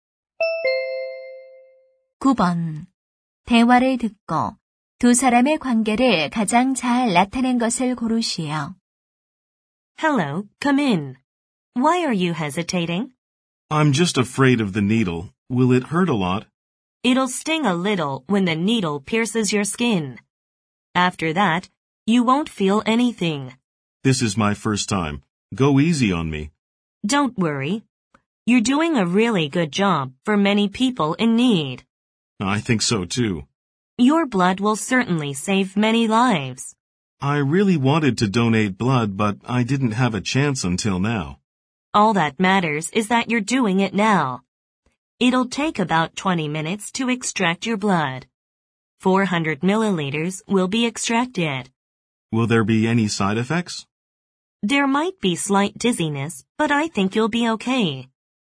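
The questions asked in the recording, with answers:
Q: 대화를 듣고 두 사람의 관계를 가장 잘 나타낸 것을 고르시오.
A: 간호사 - 헌혈자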